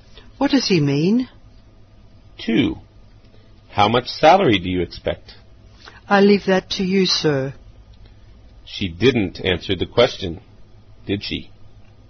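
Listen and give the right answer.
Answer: No, she left the salary up to him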